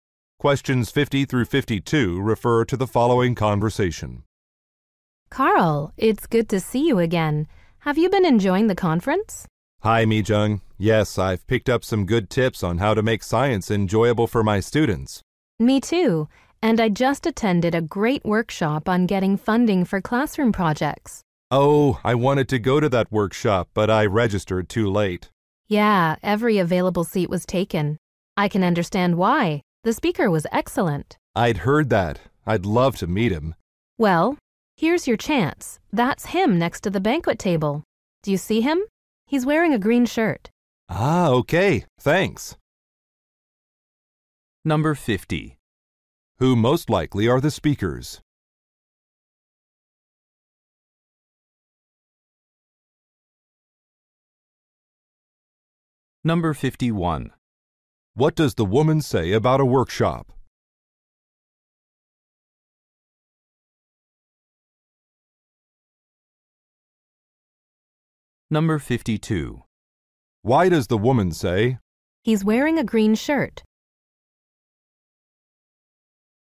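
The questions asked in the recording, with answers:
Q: Who most likely are the speakers?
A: Teachers.

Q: What does the woman say about a workshop?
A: Every seat was taken.

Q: Why does the woman say,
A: To help the man identify the speaker.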